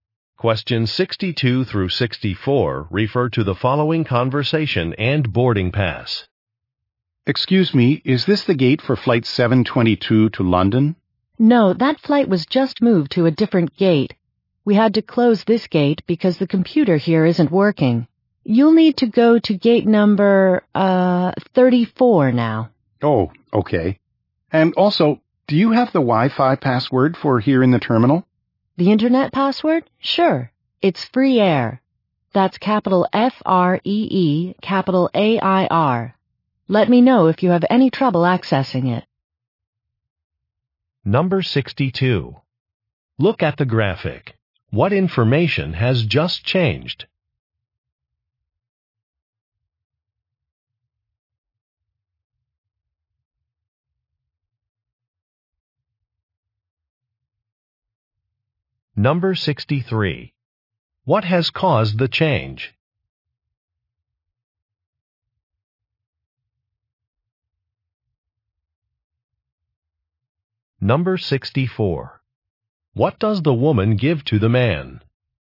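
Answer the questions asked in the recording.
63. The gate's computer isn't working
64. The Wi-Fi password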